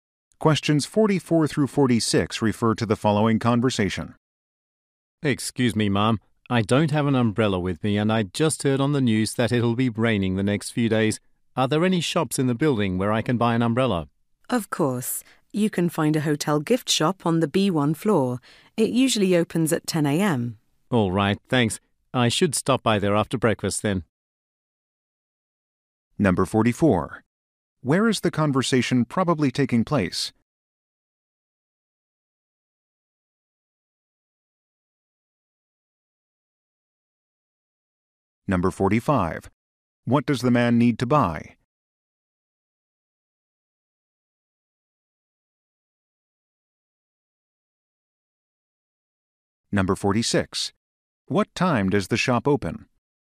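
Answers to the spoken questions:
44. At a hotel
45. An umbrella
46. 10 a.m.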